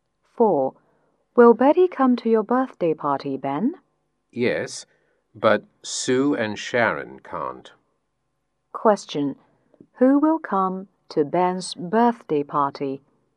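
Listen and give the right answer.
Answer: Betty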